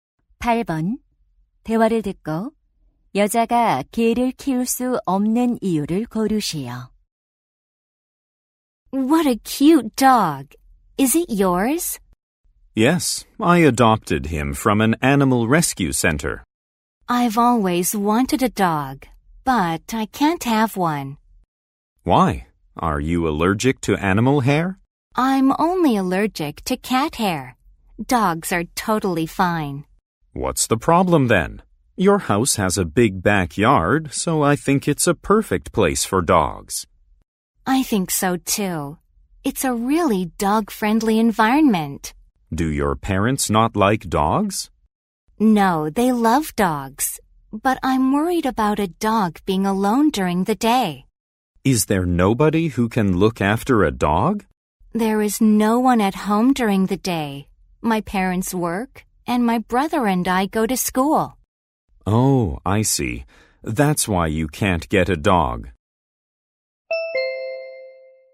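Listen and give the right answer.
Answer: 낮에 집에 개를 돌봐줄 사람이 없어서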